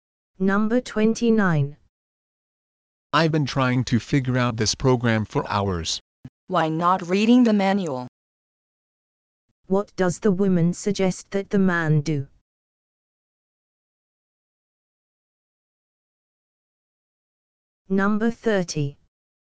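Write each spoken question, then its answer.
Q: What does the woman suggest that the man do?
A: Read the manual.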